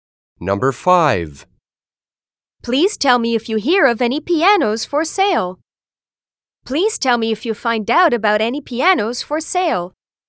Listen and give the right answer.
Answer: Same as the correct answer.